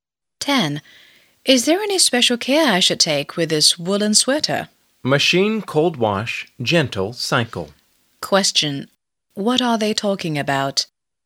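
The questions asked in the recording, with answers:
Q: What are they talking about?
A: How to wash a woolen sweater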